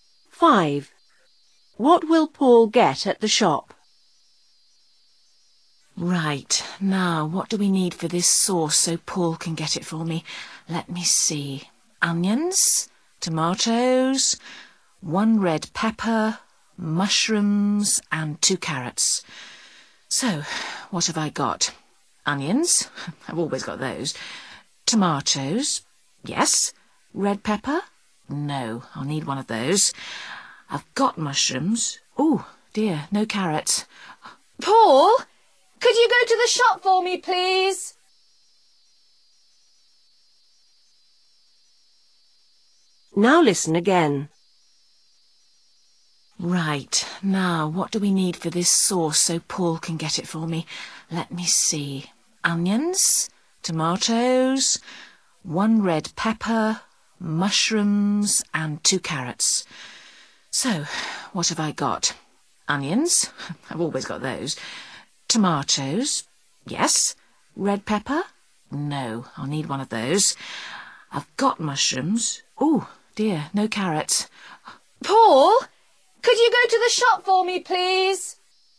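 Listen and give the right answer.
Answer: A red pepper and carrots

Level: lớp 6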